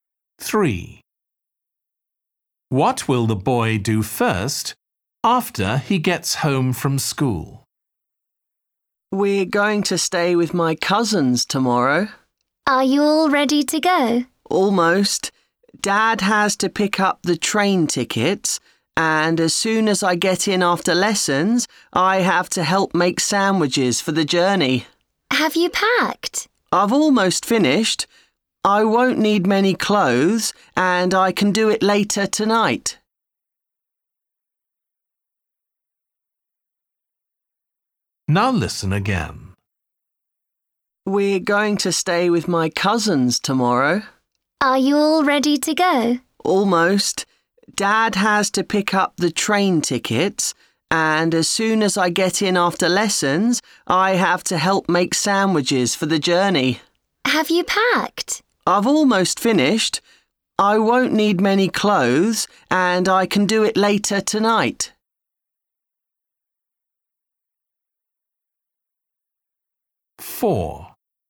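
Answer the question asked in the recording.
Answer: help make sandwiches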